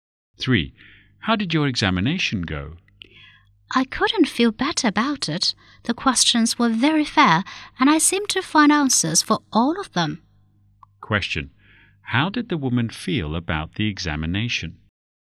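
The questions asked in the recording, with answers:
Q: How did the woman feel about the examination?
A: Very satisfied; it went well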